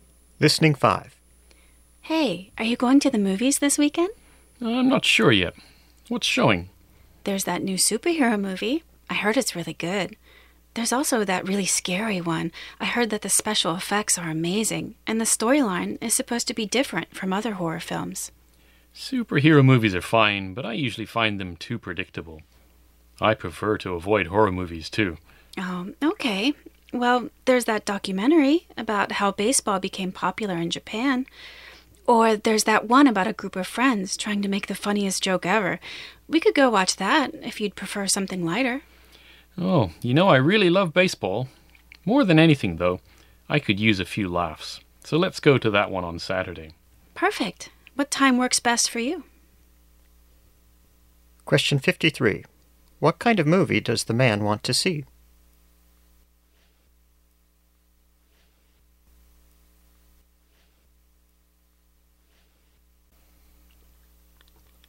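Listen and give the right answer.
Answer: A comedy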